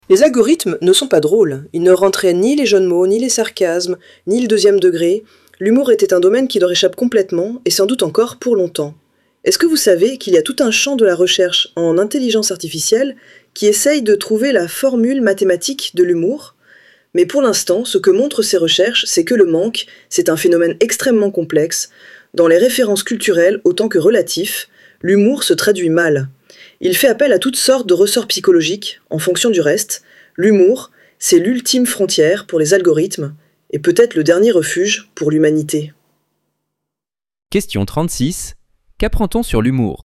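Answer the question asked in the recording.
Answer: C'est un phénomène très complexe que les algorithmes ne maîtrisent pas.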